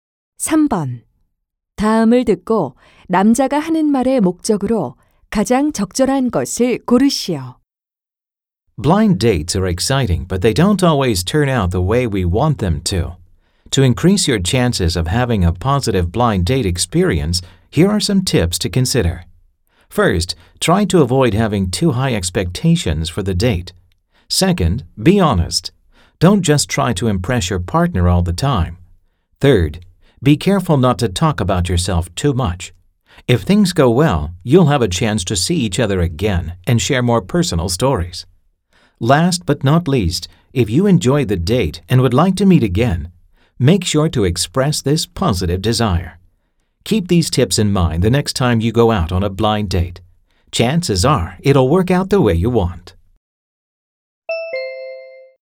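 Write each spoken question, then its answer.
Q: 다음을 듣고 남자가 하는 말의 목적으로 가장 적절한 것을 고르시오.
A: 소개팅을 성공적으로 하기 위한 조언을 하려고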